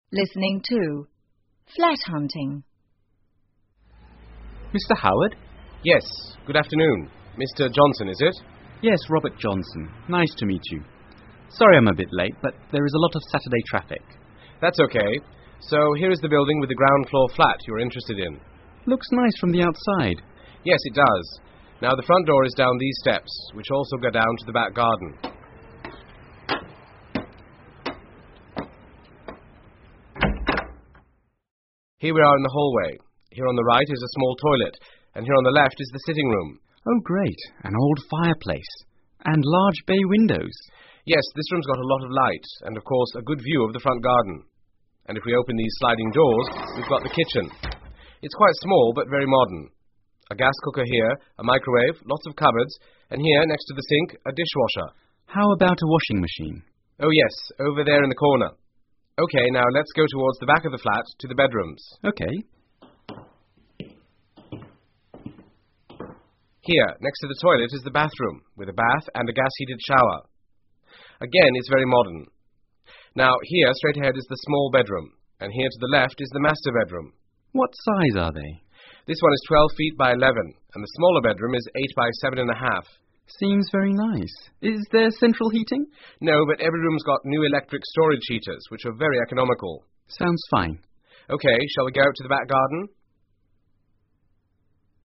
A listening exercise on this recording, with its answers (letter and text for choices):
请根据对话内容回答问题。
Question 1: Does Robert like the flat?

请根据对话内容,选出一个正确的答案。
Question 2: When did they meet?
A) On Sunday morning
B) On Sunday afternoon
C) On Saturday morning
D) On Saturday afternoon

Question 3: What does Robert like about the sitting room?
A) There is a fireplace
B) There is a fireplace and large windows.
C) There is a new fireplace.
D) There are large windows and sliding doors.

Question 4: Which of the following is not in the kitchen?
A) A microwave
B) Cups and dishes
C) A cooker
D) A dishwasher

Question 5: Which of the following best describes the flat's bathroom?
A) Modern with a separate toilet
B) Modern with a toilet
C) Old but clean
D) Fully tiled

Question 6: How big is the smaller bedroom?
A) 12 feet by 11 feet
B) 11 feet by 7 feet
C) 8 feet by 7.5 feet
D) 8feet by 7 feet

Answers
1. Yes
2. D) On Saturday afternoon
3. B) There is a fireplace and large windows.
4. B) Cups and dishes
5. A) Modern with a separate toilet
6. C) 8 feet by 7.5 feet

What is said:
Robert: Mr Howard?
Agent: Yes, good afternoon. Mr Johnson, is it?
R: Yes, Robert Johnson. Nice to meet you. Sorry I'm a bit late but there is a lot of Saturday traffic.
A: That's OK...so; here is the building with the ground-floor flat you are interested in.
R: Looks nice from the outside.
A: Yes, it does. Now the front door is down these steps which also go down to the back garden.(front door opens)
A: Here we are in the hallway. Here on the right is a small toilet...and here on the left is the sitting room.
R: Oh great, an old fireplace. And large bay windows.
A: Yes, this room's got a lot of light, and of course, a good view of the front garden. And if we open these sliding doors (sliding door sound) we've got the kitchen. It's quite small but very modern. A gas cooker here, a microwave, lots of cupboards, and here next to the sink, a dishwasher.
R: How about a washing machine?
A: Oh yes, over there in the corner. OK....now let's go towards the back of the flat to the bedrooms.
A: Here, next to the toilet is the bathroom with a bath and gas-heated shower. Again it's very modern. Now, here straight ahead is the small bedroom, and here to the left is the master bedroom.
R: What size are they?
A: This one is 12 feet by 11 and the smaller bedroom is eight by seven-and-a-half.
R: Seems very nice. Is there central heating?
A: No, but every room's got new electric storage heaters which are very economical.
R: Sounds fine.
A: OK, shall we go out to the back garden?